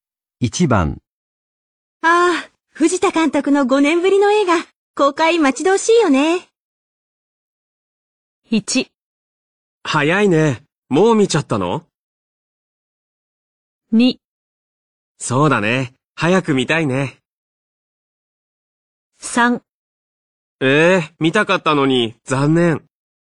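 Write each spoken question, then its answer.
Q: ああ、藤田監督の5年ぶりの映画、公開待ち遠しいよね。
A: 2: そうだね。早く見たいね。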